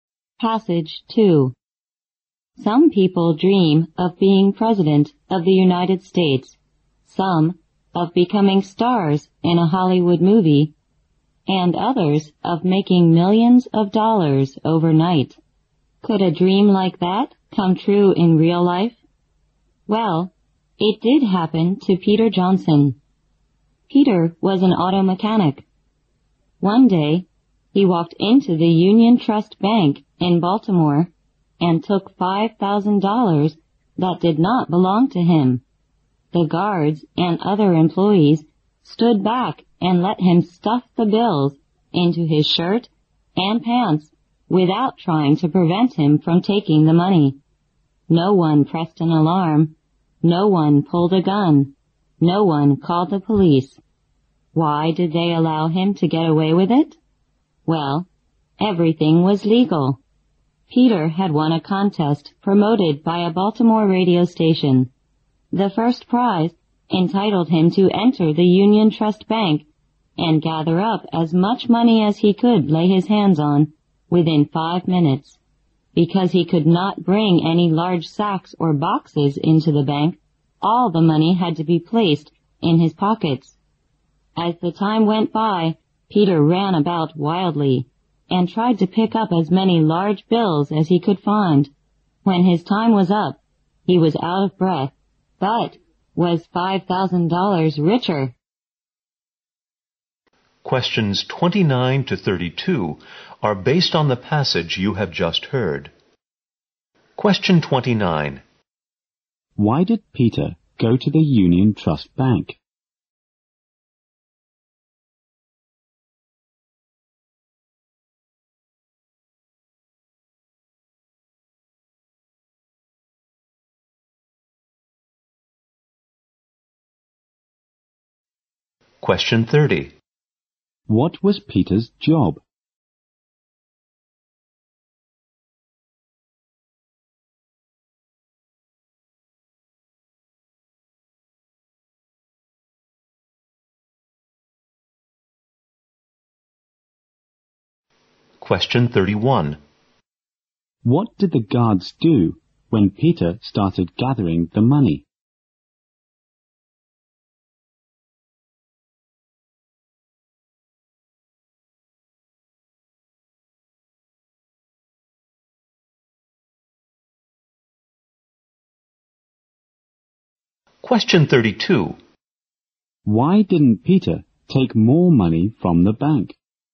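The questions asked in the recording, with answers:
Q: Why did Peter go to the Union Trust Bank?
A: He had won a radio station contest whose prize let him gather money there

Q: What was Peter's job?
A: Auto mechanic

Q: What did the guards do when Peter started gathering the money?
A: They stood back and let him take it

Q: Why didn't Peter take more money from the bank?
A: He could only use his pockets, not sacks or boxes, and had only 5 minutes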